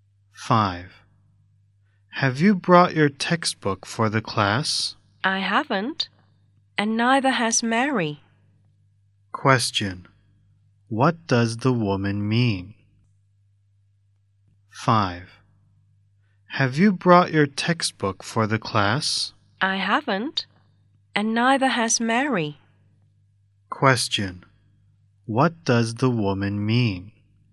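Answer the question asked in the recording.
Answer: Neither she nor Mary has brought the textbook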